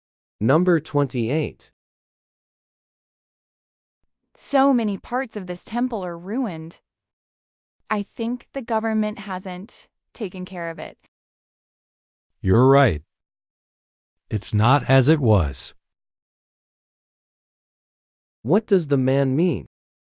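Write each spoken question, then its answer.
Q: What does the man mean?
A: The temple is not in as good condition as before.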